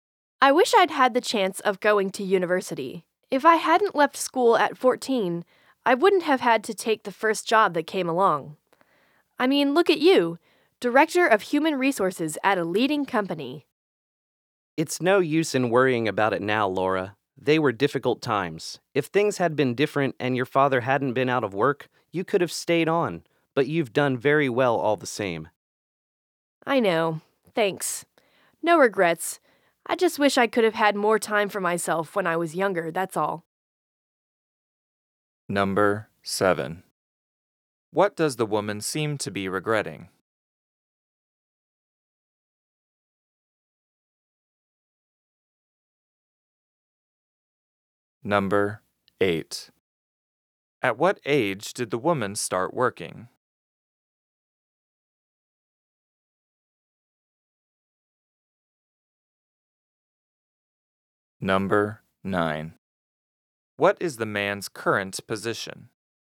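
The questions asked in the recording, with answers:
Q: What does the woman seem to be regretting?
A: Not having gone to university

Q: At what age did the woman start working?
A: At 14

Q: What is the man's current position?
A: Director of human resources at a leading company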